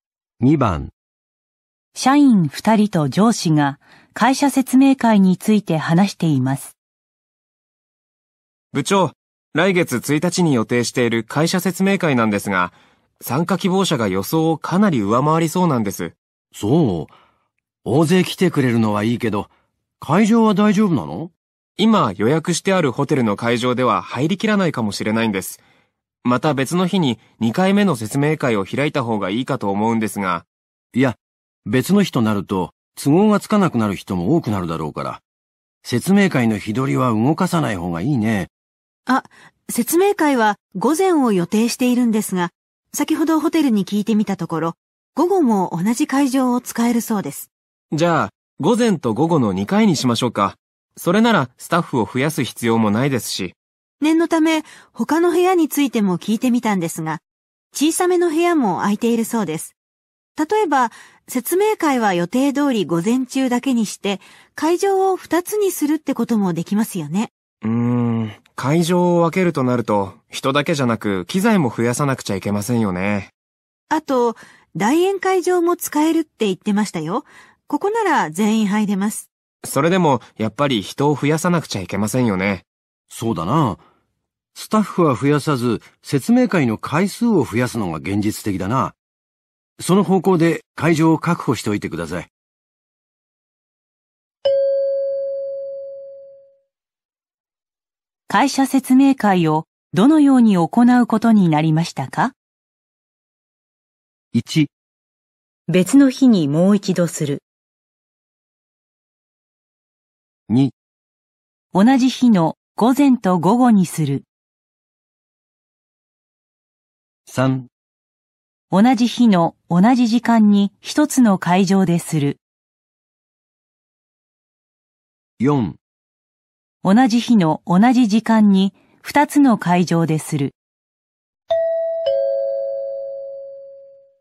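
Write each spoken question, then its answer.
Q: 会社説明会をどのように行うことになりましたか?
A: 2: 同じ日の午前と午後にする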